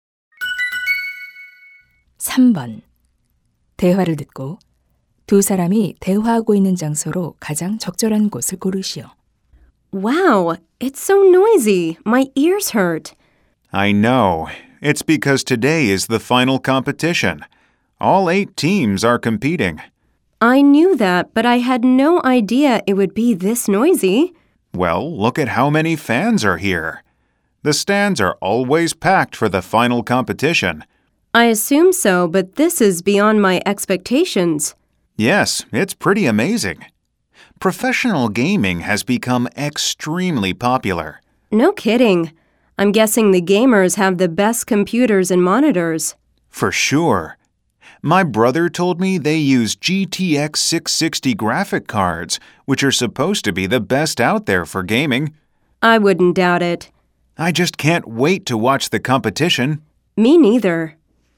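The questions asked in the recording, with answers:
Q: 대화를 듣고 두 사람이 대화하고 있는 장소로 가장 적절한 곳을 고르시오.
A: 프로 게임 대회 경기장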